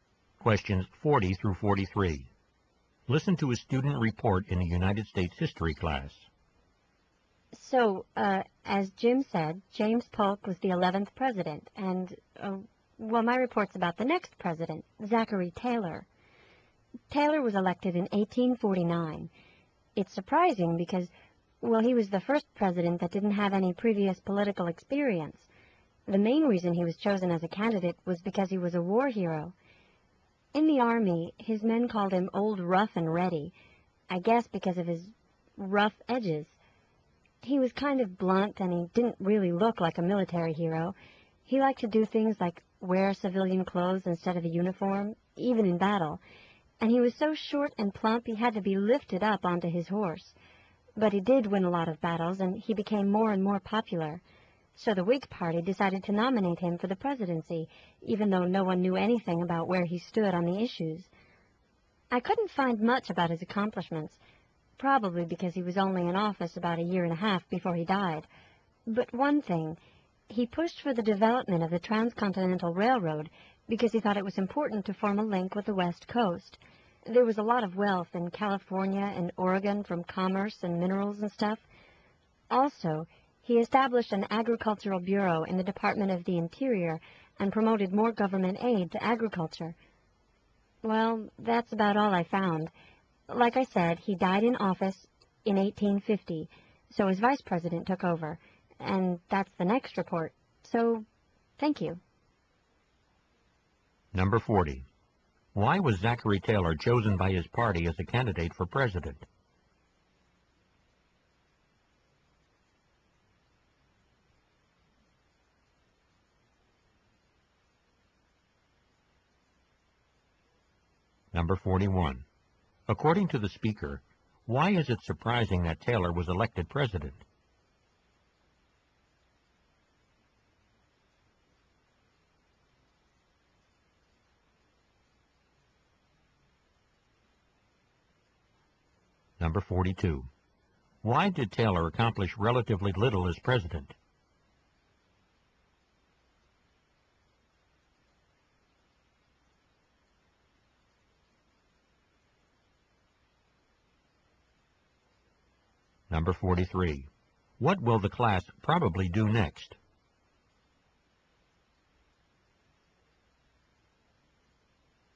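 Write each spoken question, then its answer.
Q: Why was Zachary Taylor chosen by his party as a candidate for president?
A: He was a war hero

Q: According to the speaker, why is it surprising that Taylor was elected president?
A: He had no previous political experience

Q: Why did Taylor accomplish relatively little as president?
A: He died after only about a year and a half in office

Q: What will the class probably do next?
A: Hear a report about the next president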